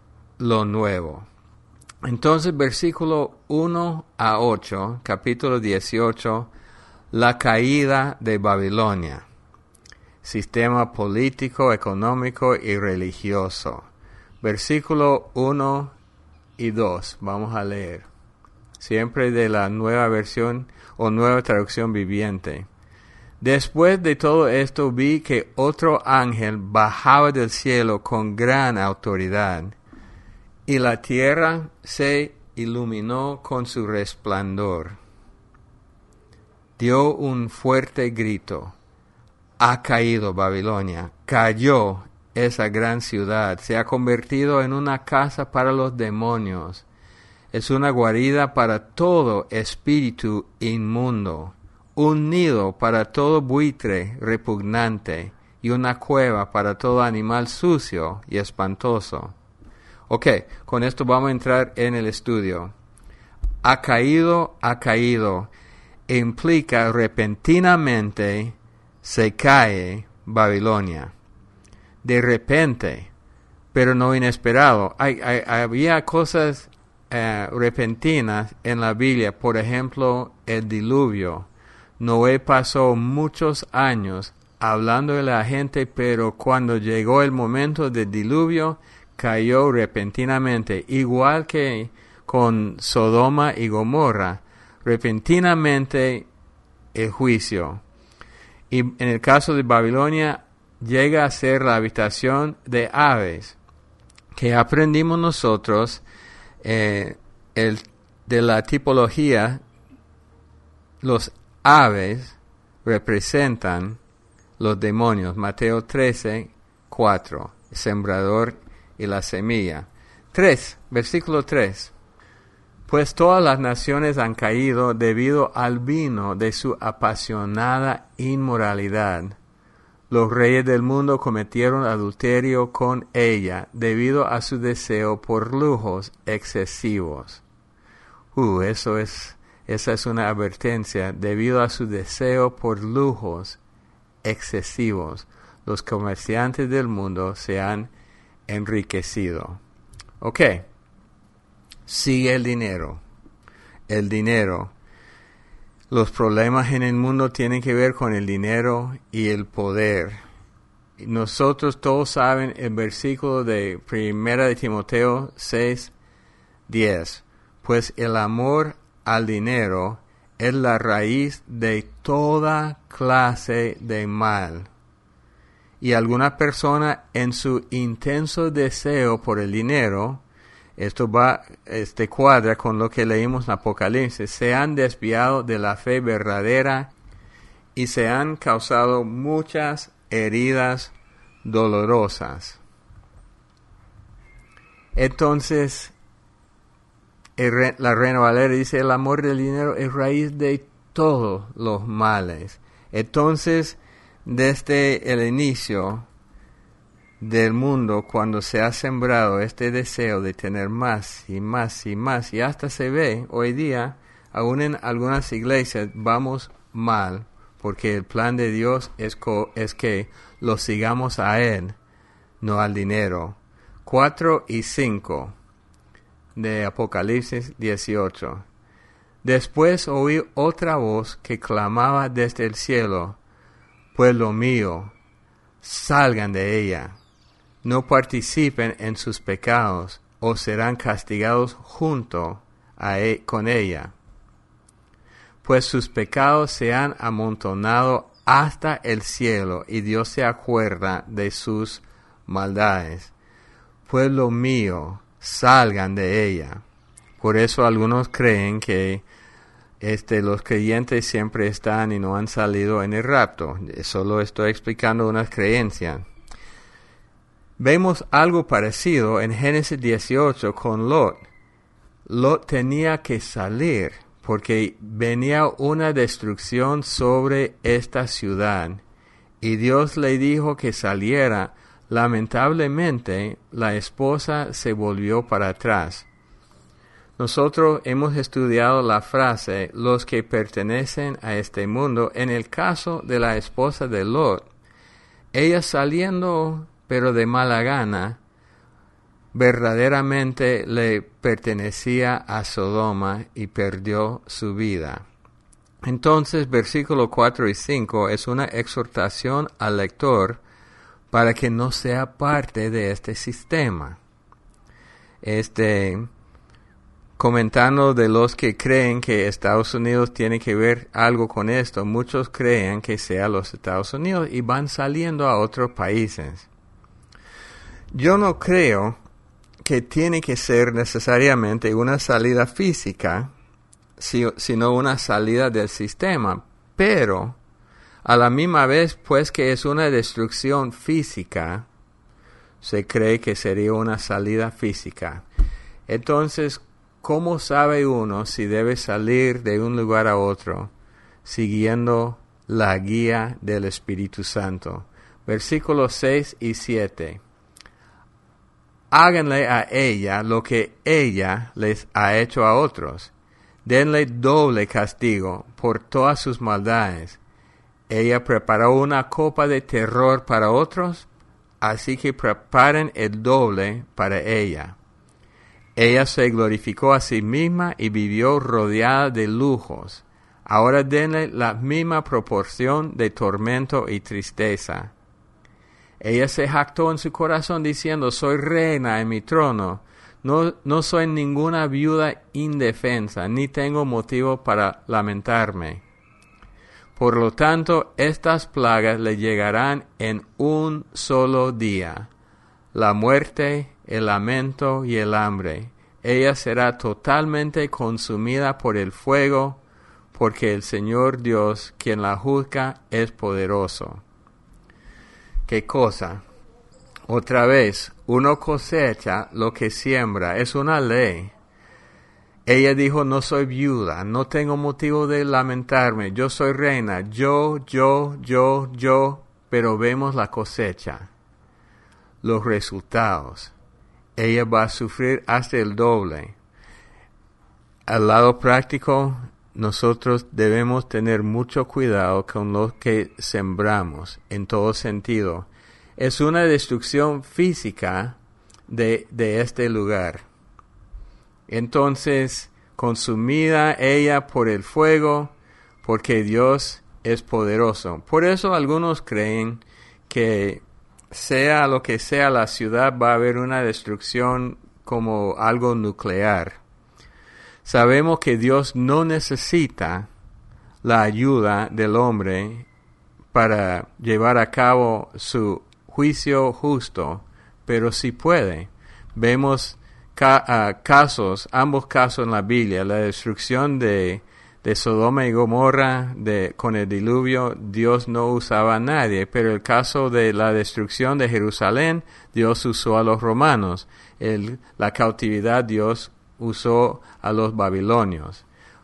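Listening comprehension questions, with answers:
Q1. v.1-8 – La caída de ________ (Religión, sistema político y económico)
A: Babilonia

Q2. v.1-2 "Ha caído, ha caído" – implica ________________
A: repentinamente

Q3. v.3 – "Sigue el ___________ ".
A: dinero

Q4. v.6-8 – Uno cosecha lo que siembra; es una _____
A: ley

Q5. Hay una destrucción _________ de este lugar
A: física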